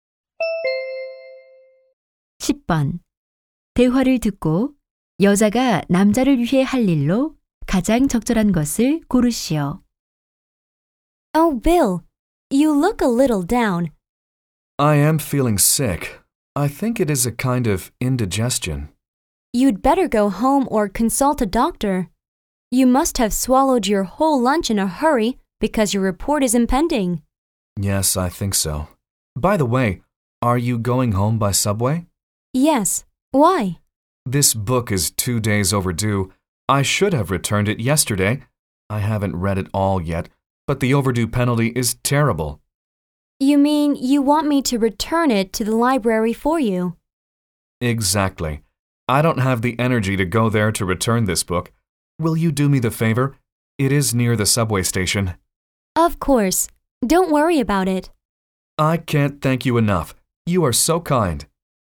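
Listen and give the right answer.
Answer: 남자 대신 도서관에 책 반납하기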